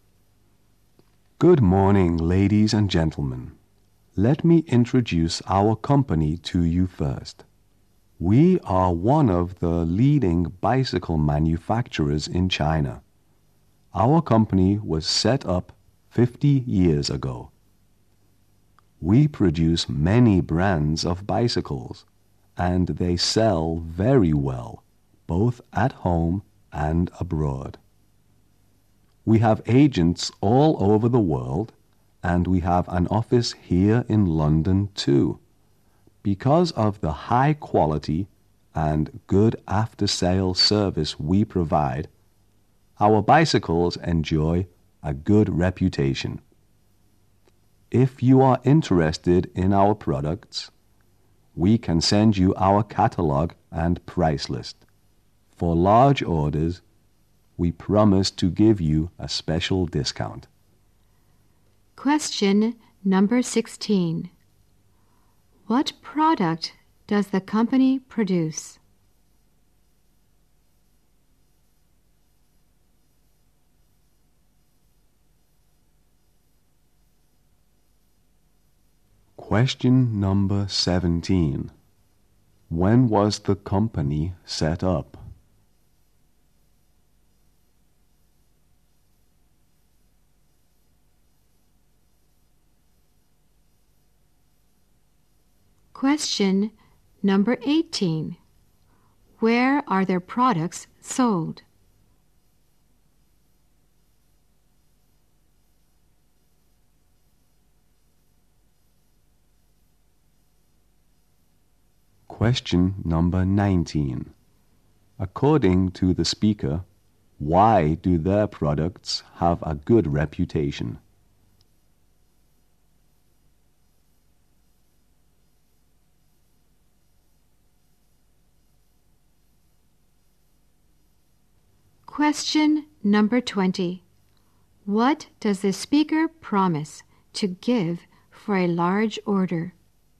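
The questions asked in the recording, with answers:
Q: What product does the company produce?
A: Bicycles.

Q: When was the company set up?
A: 50 years ago.

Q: Where are their products sold?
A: At home and abroad.

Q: According to the speaker, why do their products have a good reputation?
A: High quality and good after-sales service.

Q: What does the speaker promise to give for a large order?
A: A special discount.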